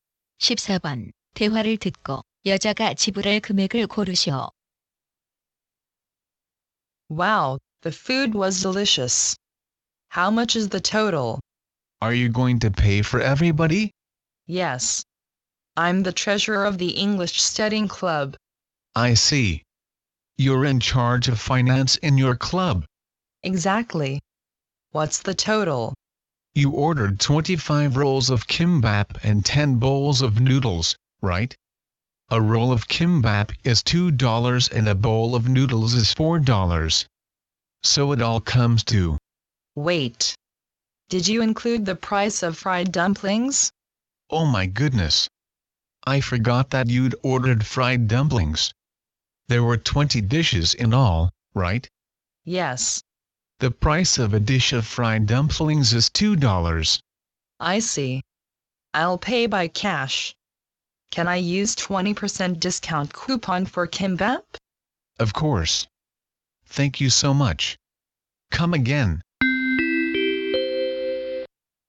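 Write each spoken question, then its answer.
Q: 대화를 듣고 여자가 지불할 금액을 고르시오.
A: $120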